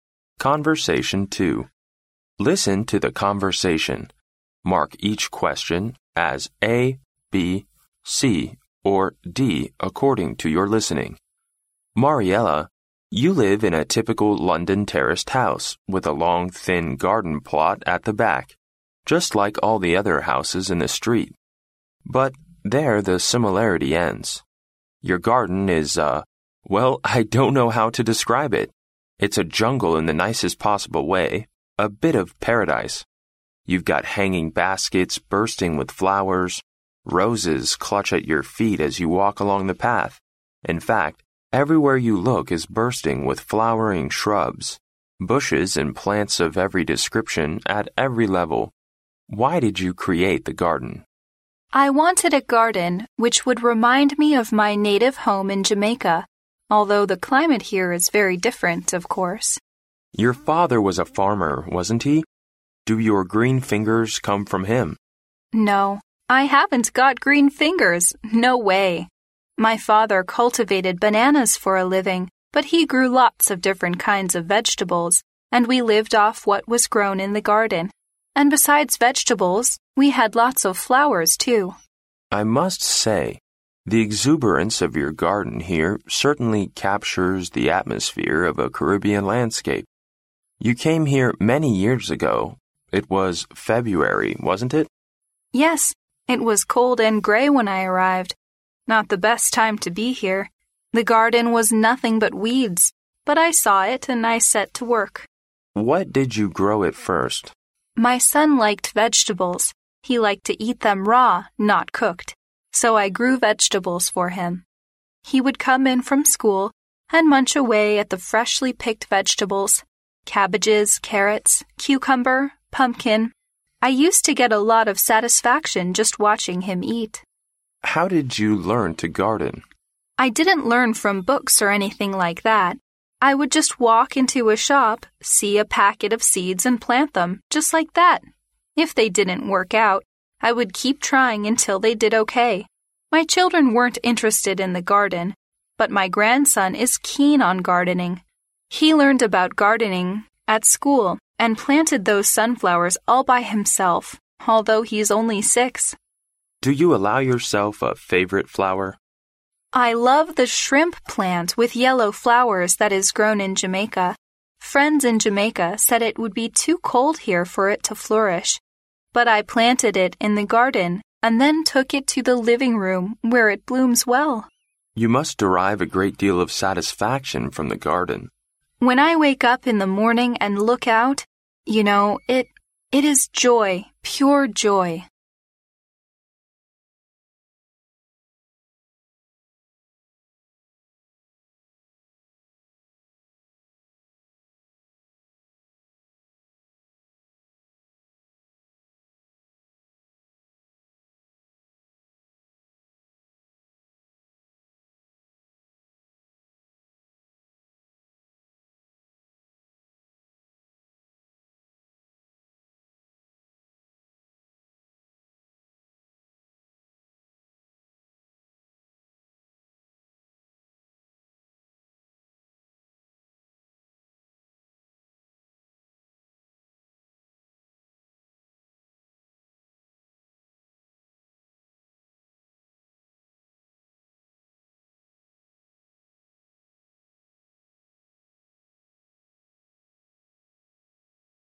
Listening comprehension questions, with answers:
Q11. What does the interviewer find surprising about Mariella's house?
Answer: She plants many kinds of flowers in the backyard.

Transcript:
M: Mariella, you live in a typical London terraced house, with a long thin garden plot at the back, just like all the other houses in the street. But there the similarity ends. Your garden is a―well, I don't know how to describe it—it's a jungle in the nicest possible way, a bit of paradise! You've got hanging baskets bursting with flowers, roses clutch at your feet as you walk along the path. In fact, everywhere you look is bursting with flowering shrubs, bushes and plants of every description at every level! Why did you create the garden?
W: I wanted a garden which would remind me of my native home in Jamaica, although the climate here is very different, of course.
M: Your father was a farmer, wasn't he? Do your green fingers come from him?
W: No, I haven't got green fingers! No way! My father cultivated bananas for a living but he grew lots of different kinds of vegetables and we lived off what was grown in the garden. And besides vegetables, we had lots of flowers too.
M: I must say, the exuberance of your garden here certainly captures the atmosphere of a Caribbean landscape. You came here many years ago—it was February, wasn't it?
W: Yes, it was cold and grey when I arrived—not the best time to be here! The garden was nothing but weeds but I saw it and I set to work.
M: What did you grow at first?
W: My son liked vegetables. He liked to eat them raw, not cooked. So I grew vegetables for him. He would come in from school and munch away at the freshly-picked vegetables: cabbages, carrots, cucumber, pumpkin. I used to get a lot of satisfaction just watching him eat.
M: How did you learn to garden?
W: I didn't learn from books or anything like that. I would just walk into a shop, see a packet of seeds and plant them, just like that! If they didn't work out, I would keep trying until they did okay. My children weren't interested in the garden but my grandson is keen on gardening. He learned about gardening at school and planted those sunflowers all by himself, although he's only six.
M: Do you allow yourself a favourite flower?
W: I love the shrimp plant with yellow flowers that is grown in Jamaica. Friends in Jamaica said it would be too cold here for it to flourish, but I planted it in the garden and then took it to the living room, where it blooms well.
M: You must derive a great deal of satisfaction from the garden.
W: When I wake up in the morning and look out, you know, it...it is joy, pure joy.